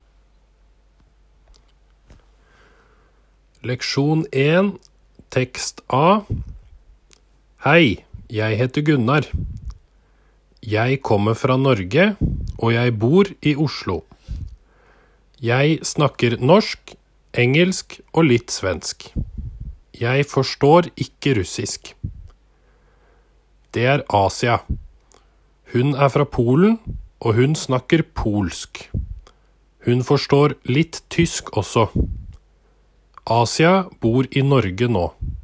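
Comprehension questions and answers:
Posłuchaj tekstu i odpowiedz na pytania jednym słowem.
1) Hvor bor han? (miasto)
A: Oslo

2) Hvor kommer han fra?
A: Norge

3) Hvilke språk snakker han?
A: norsk, engelsk og litt svensk

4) Hvilket språk forstår han ikke?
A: russisk

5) Hvor er Asia fra?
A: Polen

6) Hvor bor Asia nå?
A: Norge

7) Hvilket språk forstår Asia?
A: tysk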